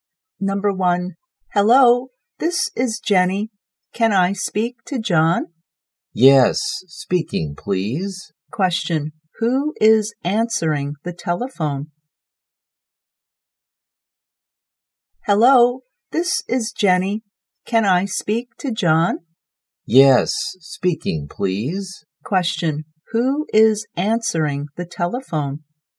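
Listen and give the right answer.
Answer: John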